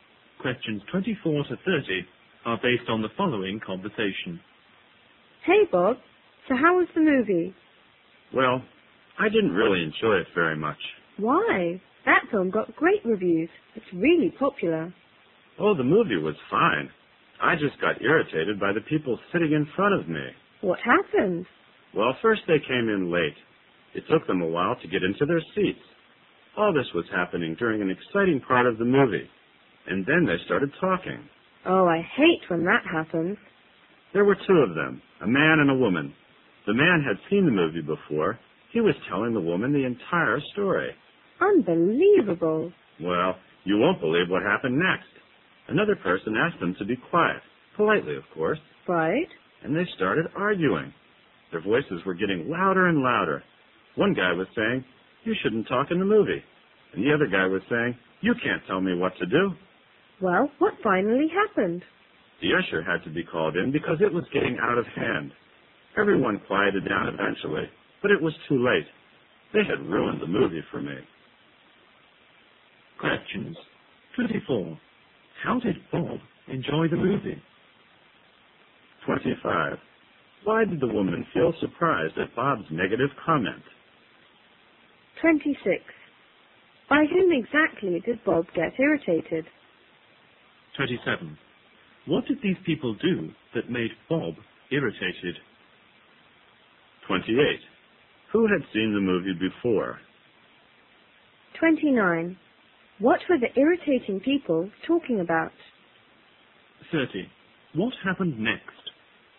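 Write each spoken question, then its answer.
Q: How did Bob enjoy the movie?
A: Not very much

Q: Why did the woman feel surprised at Bob's negative comment?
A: The film got great reviews and is popular

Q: By whom exactly did Bob get irritated?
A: The people sitting in front of him

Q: What did these people do that made Bob irritated?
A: They came in late and talked during the movie

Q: Who had seen the movie before?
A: The man sitting in front of Bob

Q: What were the irritating people talking about?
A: The story of the movie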